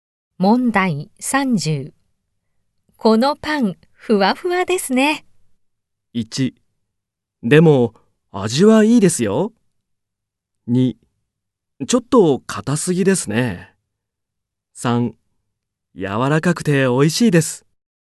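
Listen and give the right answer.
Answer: 3: 柔らかくて美味しいです。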